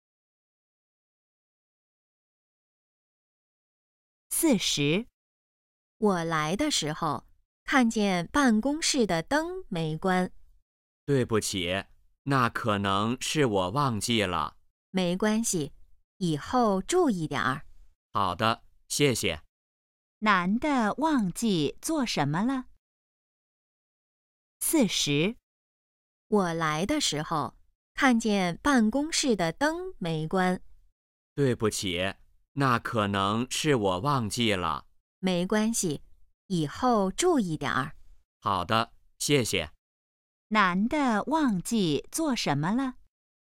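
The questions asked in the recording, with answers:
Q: 男的忘记做什么了?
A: 关办公室的灯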